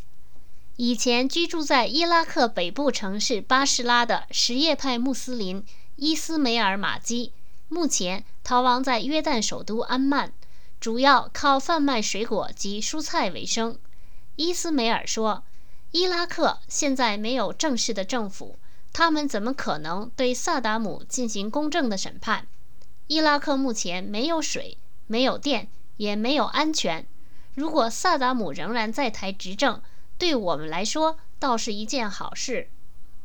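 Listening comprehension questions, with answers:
Please answer the following questions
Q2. 什叶派穆斯林伊斯梅尔怎么看萨达姆受审?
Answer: 他认为伊拉克现在没有正式政府,不可能对萨达姆进行公正的审判;伊拉克没有水、电和安全,萨达姆仍执政反倒是好事。

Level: 3rd Year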